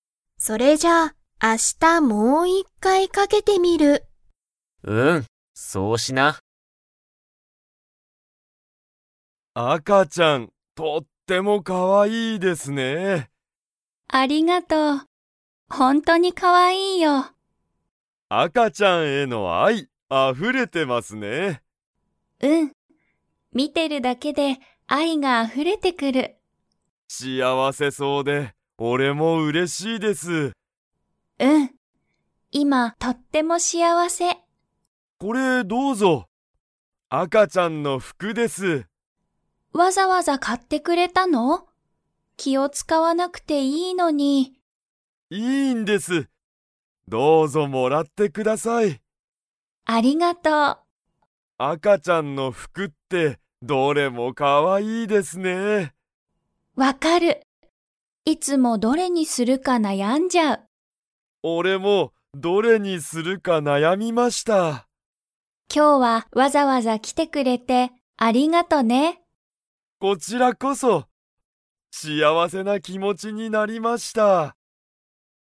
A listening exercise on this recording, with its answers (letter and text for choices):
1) こうたは、ゆかに何なにを買かいましたか?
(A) 英語えいごの本ほん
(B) ゲーム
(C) 赤あかちゃんの服ふく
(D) ゆかの服ふく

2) こうたは、どれにするか 。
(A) 悩なやんだ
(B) 悩なやまなかった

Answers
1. (C) 赤あかちゃんの服ふく
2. (A) 悩なやんだ

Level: Level 4